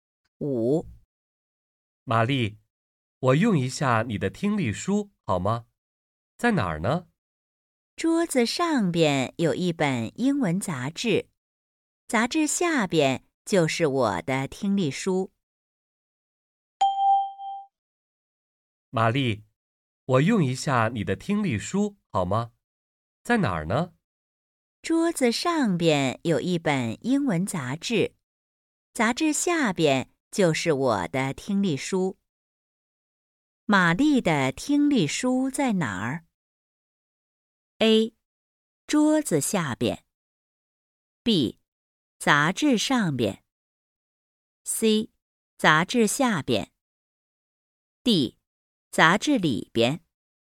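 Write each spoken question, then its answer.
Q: 玛丽的听力书在哪儿?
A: C: 杂志下边。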